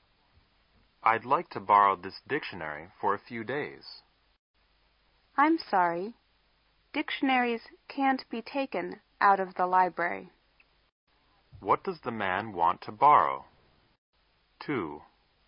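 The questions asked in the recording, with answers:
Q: What does the man want to borrow?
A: A dictionary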